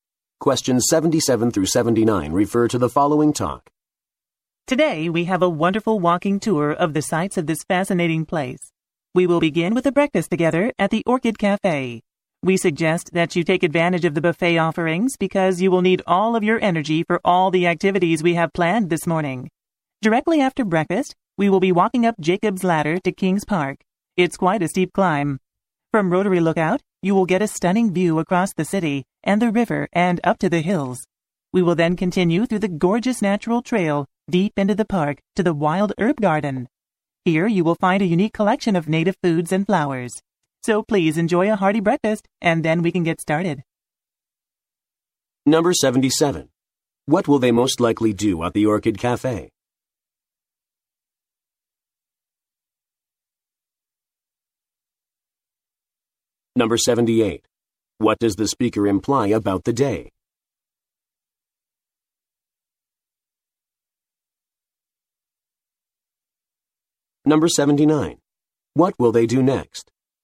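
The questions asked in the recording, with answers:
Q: What will they most likely do at the Orchid Cafe?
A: Have breakfast (buffet)

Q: What does the speaker imply about the day?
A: It will be an active, tiring day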